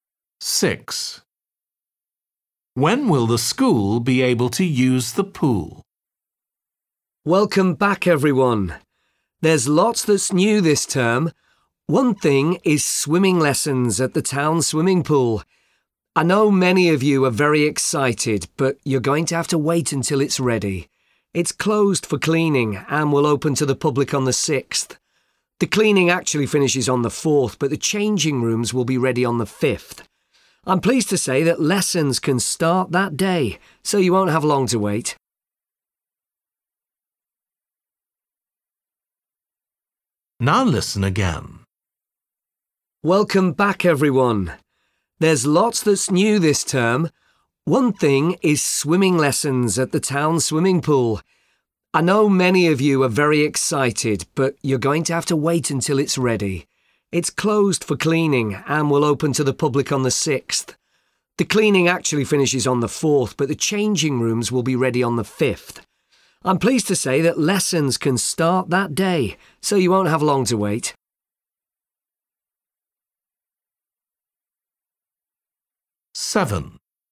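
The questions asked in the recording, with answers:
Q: When will the school be able to use the pool?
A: on the 5th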